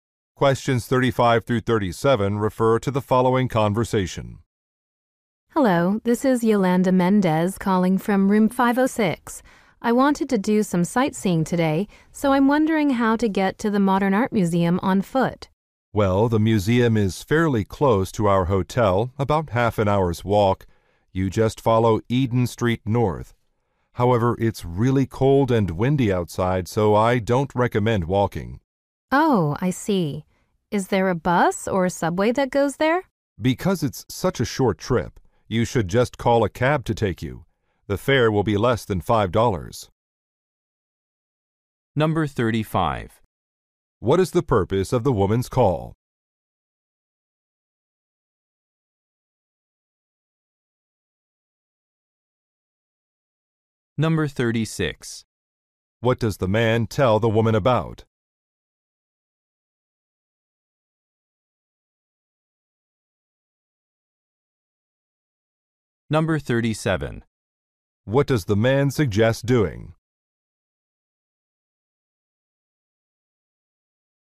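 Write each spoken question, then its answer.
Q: What is the purpose of the woman's call?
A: To ask how to walk to the Modern Art Museum

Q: What does the man tell the woman about?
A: The cold, windy weather

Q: What does the man suggest doing?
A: Taking a cab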